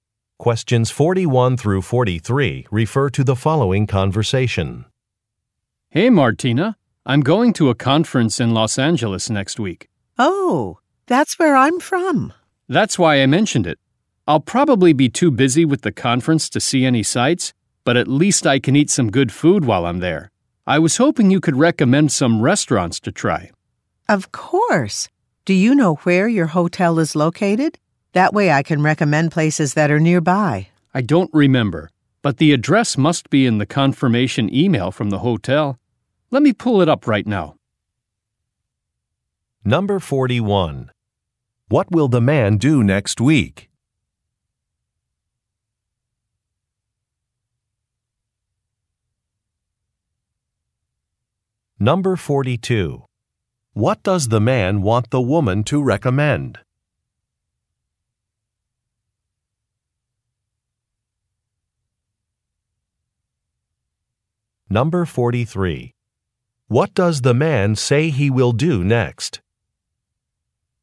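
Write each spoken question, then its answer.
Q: What will the man do next week?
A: Attend a conference in Los Angeles

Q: What does the man want the woman to recommend?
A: Restaurants

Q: What does the man say he will do next?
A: Check the hotel confirmation email for the address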